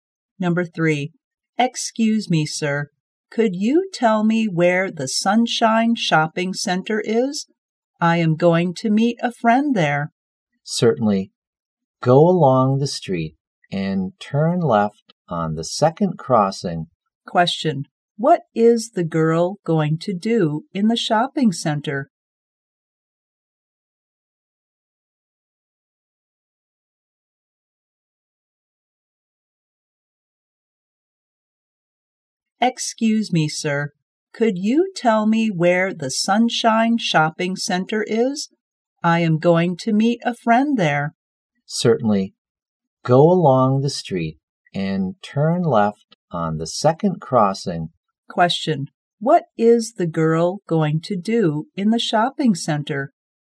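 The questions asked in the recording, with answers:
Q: what is the girl going to do in the shopping center?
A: Meet a friend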